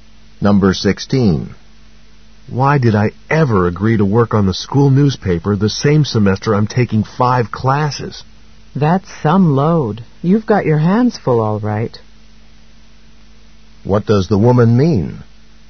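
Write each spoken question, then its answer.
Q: What does the woman mean?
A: The man is very busy.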